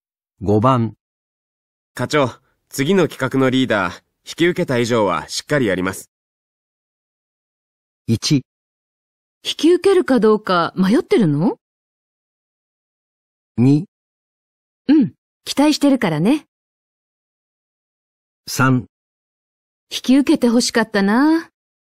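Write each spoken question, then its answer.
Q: 課長、次の企画のリーダー、引き受けた以上はしっかりやります。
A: 2: うん、期待してるからね。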